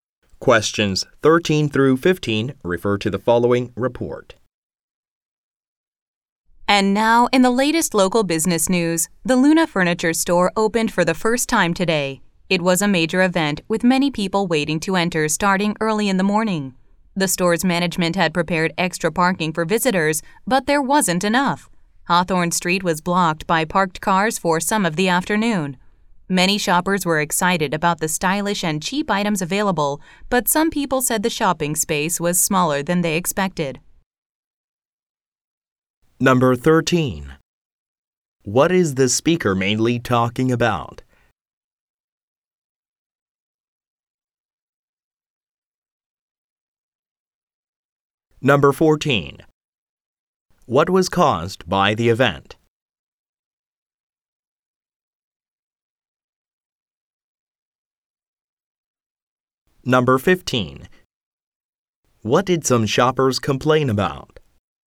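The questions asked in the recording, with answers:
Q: What is the speaker mainly talking about?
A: The opening of a new furniture store

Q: What was caused by the event?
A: A street was blocked by parked cars

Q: What did some shoppers complain about?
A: The shopping space was smaller than expected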